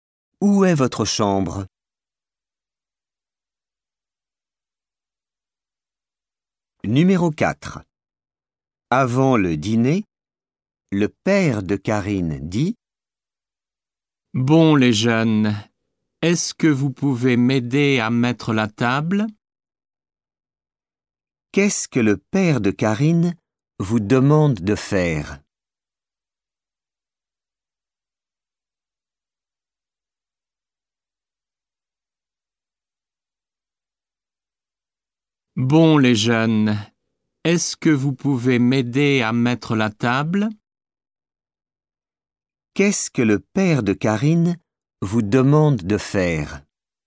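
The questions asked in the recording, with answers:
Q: Qu'est-ce que le père de Karine vous demande de faire?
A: Mettre la table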